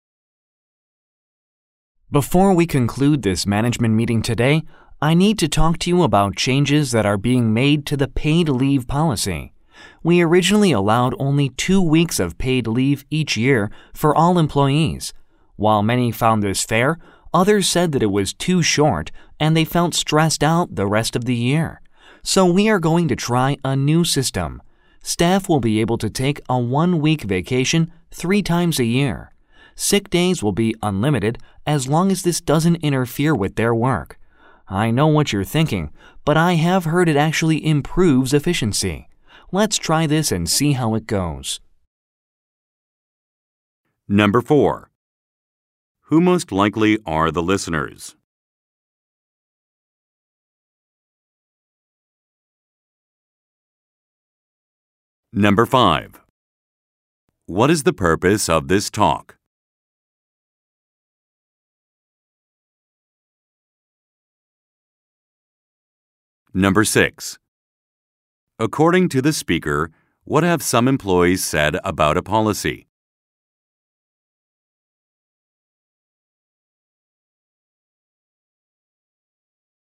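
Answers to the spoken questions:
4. Managers
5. To announce changes to the paid leave policy
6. The paid leave was too short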